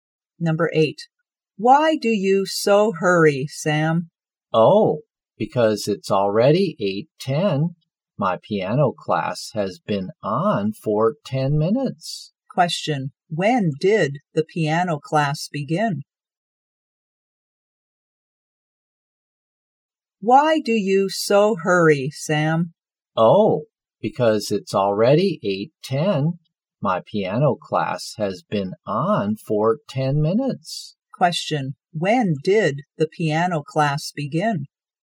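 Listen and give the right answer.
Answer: At 8:00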